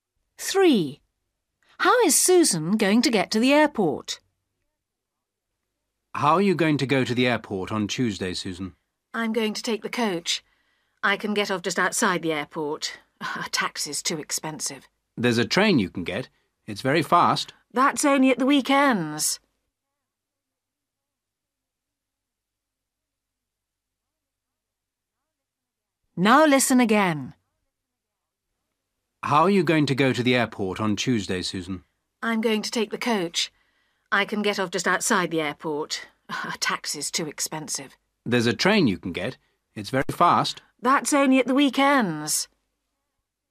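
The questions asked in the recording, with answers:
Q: How is Susan going to get to the airport?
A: By coach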